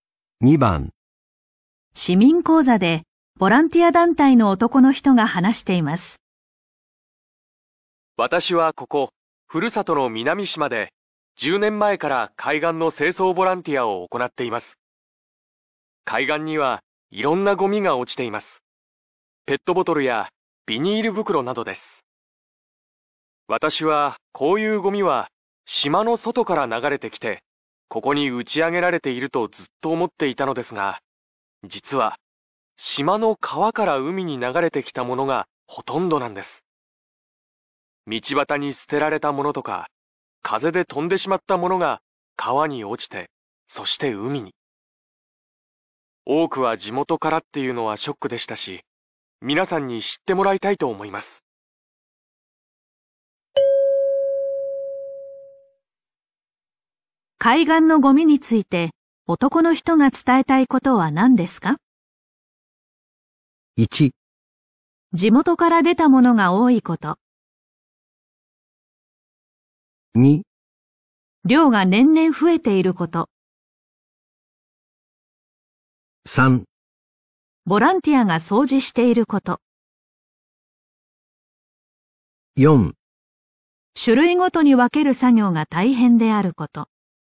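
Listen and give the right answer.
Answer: 1: 地元から出たものが多いこと。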